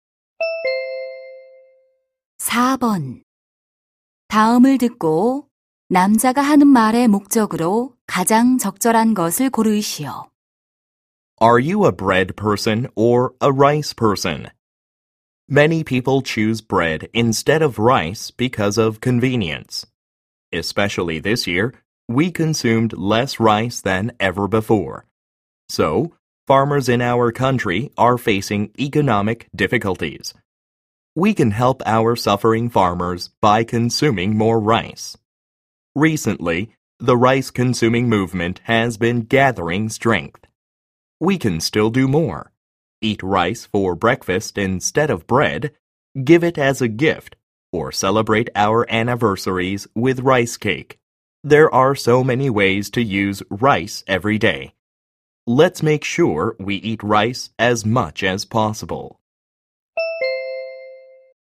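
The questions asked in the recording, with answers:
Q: 다음을 듣고 남자가 하는 말의 목적으로 가장 적절한 것을 고르시오.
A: 쌀 소비를 늘리자고 권장하려고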